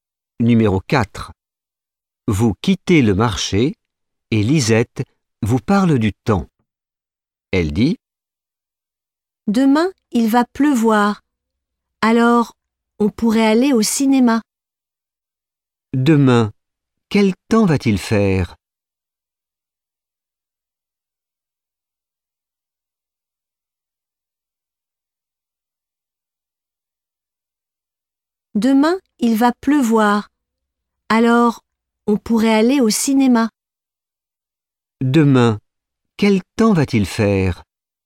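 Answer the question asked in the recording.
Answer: Il va pleuvoir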